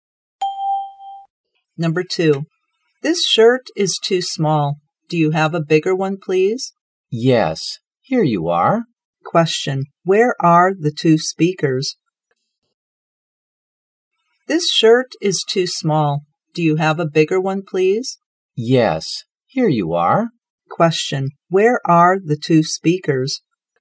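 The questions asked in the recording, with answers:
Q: Where are the two speakers?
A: In a clothes shop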